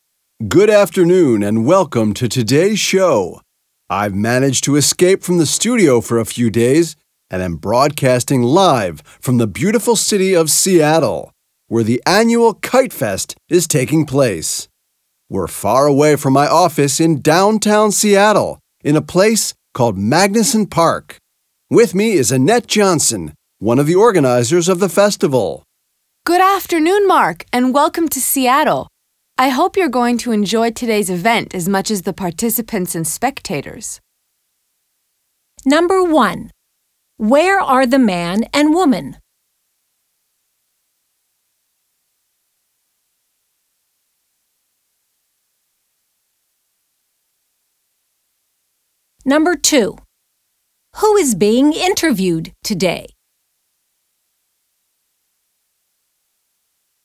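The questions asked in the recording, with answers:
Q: Where are the man and woman?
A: At the Kite Fest in Magnuson Park, Seattle

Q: Who is being interviewed today?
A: Annette Johnson, one of the festival organizers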